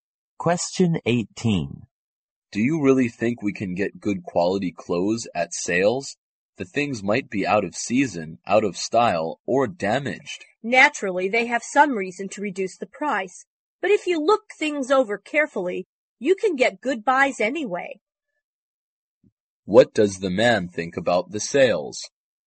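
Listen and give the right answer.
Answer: You can get good buys if you look things over carefully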